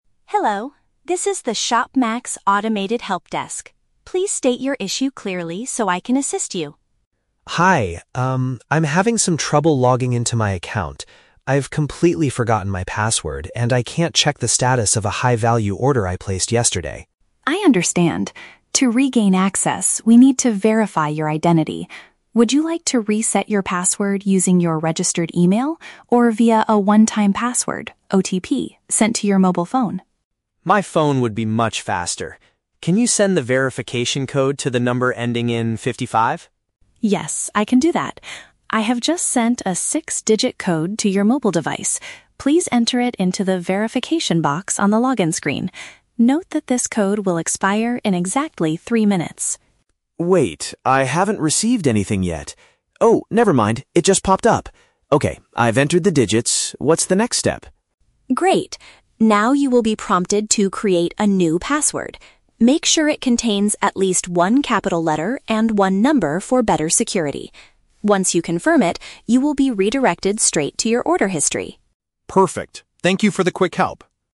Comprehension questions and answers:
Listen to a conversation between a customer and an automated support system. Choose the best answer (A, B, or C) for each question.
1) Why does the customer need to access his account immediately?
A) To cancel a delivery that he accidentally ordered this morning.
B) To find out the current situation of an expensive purchase.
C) To update his new mobile phone number on the profile page.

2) Which method does the customer choose to prove who he is?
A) Receiving a digital code on his handheld communication device.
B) Clicking on a secure link sent to his personal email address.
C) Answering several private questions about his last three orders.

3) What is a requirement for the customer's new password?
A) It must be exactly six digits long to match the verification code.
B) It must be changed every three minutes to ensure maximum safety.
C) It must include both an uppercase letter and a numerical character.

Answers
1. B
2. A
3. C

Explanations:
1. The customer says he needs to "check the status of a high-value order." Option B uses synonyms: "current situation" (status) and "expensive purchase" (high-value order).
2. The customer says, "My phone would be much faster" and asks for a "verification code." Option A paraphrases this as "receiving a digital code on his handheld communication device."
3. The support system tells him to "make sure it contains at least one capital letter and one number." Option C uses synonyms: "uppercase letter" (capital letter) and "numerical character" (number).

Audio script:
Support: Hello! This is the ShopMax automated help desk. Please state your issue clearly so I can assist you.
Customer: Hi. Um, I'm having some trouble logging into my account. I've completely forgotten my password and I can't check the status of a high-value order I placed yesterday.
Support: I understand. To regain access, we need to verify your identity. Would you like to reset your password using your registered email or via a one-time password (OTP) sent to your mobile phone?
Customer: My phone would be much faster. Can you send the verification code to the number ending in 55?
Support: Yes, I can do that. I have just sent a six-digit code to your mobile device. Please enter it into the "Verification" box on the login screen. Note that this code will expire in exactly three minutes.
Customer: Wait, I haven't received anything yet. Oh, never mind, it just popped up! Okay, I've entered the digits. What's the next step?
Support: Great. Now, you will be prompted to create a new password. Make sure it contains at least one capital letter and one number for better security. Once you confirm it, you will be redirected straight to your order history.

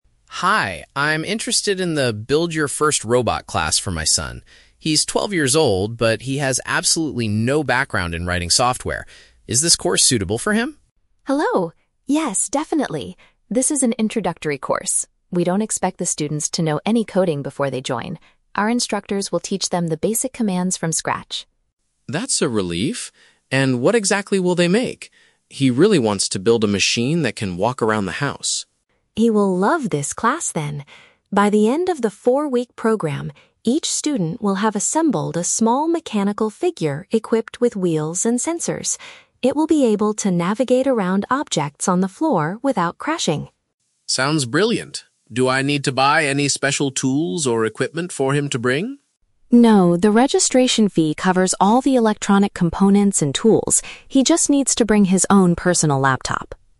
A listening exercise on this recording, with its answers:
Listen to a conversation between a parent and a tech center receptionist. For each question, choose the correct answer (A, B, or C).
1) What is the main requirement for students joining the robotics class?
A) They must already know how to write computer programs.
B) They do not need any prior programming knowledge.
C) They must have completed a previous electronics course.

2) What will the students' invention be able to do by the end of the course?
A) Move around the room while avoiding obstacles.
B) Walk around the house on two mechanical legs.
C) Clean the floor using special built-in sensors.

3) What does the father need to provide for his son?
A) A set of basic mechanical tools.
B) Extra money for the electronic parts.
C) A portable computer to use during the lessons.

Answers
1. B
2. A
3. C

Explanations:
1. Chloe states that they "don't expect the students to know any coding before they join." Option (B) paraphrases "know any coding" as "prior programming knowledge." Option (A) is the exact opposite of what the receptionist says. Option (C) sounds like a plausible requirement for a tech class, but it is not mentioned in the audio.
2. Chloe explains that the robot will "navigate around objects on the floor without crashing." Option (A) uses synonyms ("Move around" for "navigate", "avoiding obstacles" for "without crashing"). Option (B) is a trap; the father mentions he wants it to "walk," but Chloe specifies the robot is equipped with "wheels," not legs. Option (C) is a trap; the word "sensors" is mentioned, but they are not used for cleaning.
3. Chloe tells Mr. Harris that his son "just needs to bring his own personal laptop." Option (C) paraphrases "laptop" as "portable computer." Option (A) is a trap; Chloe explicitly says the registration fee covers all the tools. Option (B) is also a trap; the electronic components are already included in the fee.

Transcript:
Harris: Hi, I'm interested in the "Build Your First Robot" class for my son. He's twelve years old, but he has absolutely no background in writing software. Is this course suitable for him?
Chloe: Hello! Yes, definitely. This is an introductory course. We don't expect the students to know any coding before they join. Our instructors will teach them the basic commands from scratch.
Harris: That's a relief. And what exactly will they make? He really wants to build a machine that can walk around the house.
Chloe: He will love this class then! By the end of the four-week program, each student will have assembled a small mechanical figure equipped with wheels and sensors. It will be able to navigate around objects on the floor without crashing.
Harris: Sounds brilliant. Do I need to buy any special tools or equipment for him to bring?
Chloe: No, the registration fee covers all the electronic components and tools. He just needs to bring his own personal laptop.

